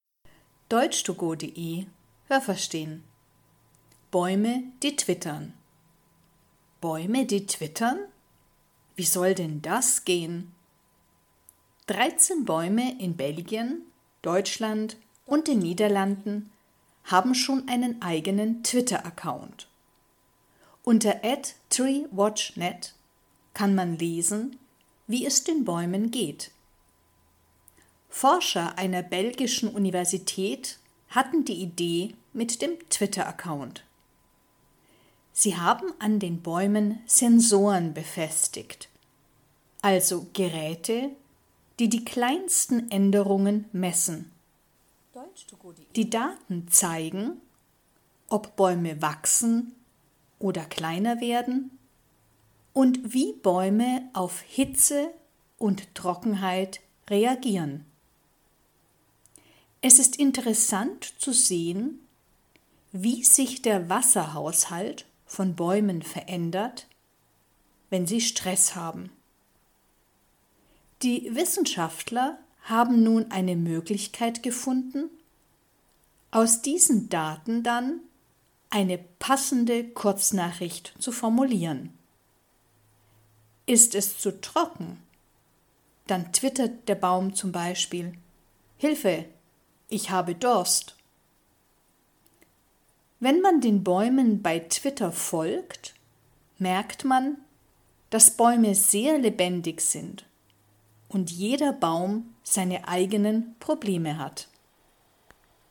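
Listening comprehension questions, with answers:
Welches Verb passt?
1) Bäume, die twittern? Wie soll denn das _____ ?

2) Man kann lesen, wie es den Bäumen _____ .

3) Kleine Geräte _____ die kleinsten Änderungen.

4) Die Daten zeigen, ob Bäume _____ .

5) Hilfe! Ich _____ Durst.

Haben Sie das gehört? Stimmt diese Aussage?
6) Die Bäume, die twittern, stehen in Europa.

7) Im Twitteraccount der Bäume kann man lesen, wie man zu den Bäumen geht.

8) Die Forscher einer britischen Universität hatten die Idee mit dem Twitteraccount.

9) Die Geräte an den Bäumen messen, wie die Bäume auf Trockenheit reagieren.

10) Der Wasserhaushalt von Bäumen ändert sich, wenn sie Stress haben.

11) Wissenschaftler können aus den Daten eine passende Kurznachricht machen.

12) Alle Bäume haben die gleichen Probleme.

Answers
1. gehen
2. geht
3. messen
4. wachsen
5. habe
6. richtig
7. falsch
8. falsch
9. richtig
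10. richtig
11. richtig
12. falsch

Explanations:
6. Sie stehen in Belgien, Deutschland und den Niederlanden. (Stand: November 2017)
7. Man kann lesen, wie es den Bäumen geht.
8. Es waren Forscher einer belgischen Universität (= Universität in Belgien).
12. Jeder Baum hat seine eigenen Probleme.

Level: Hörtexte A (einfach)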